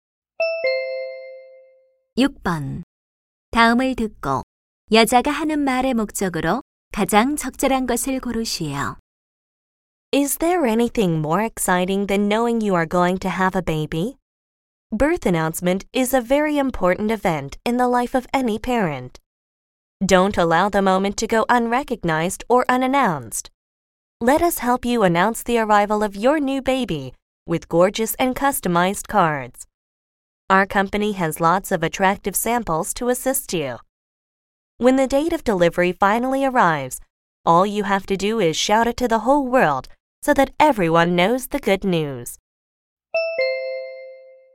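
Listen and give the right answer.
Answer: 출산 알림 카드 제작 광고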